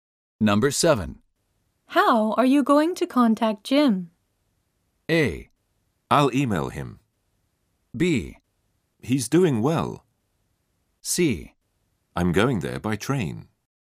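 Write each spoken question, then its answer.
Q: How are you going to contact Jim?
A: A: I'll email him.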